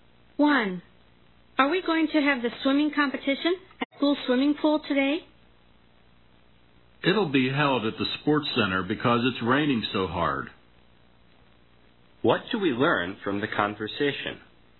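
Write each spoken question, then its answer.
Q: What do we learn from the conversation?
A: The swimming competition will be held at the sports center because of heavy rain.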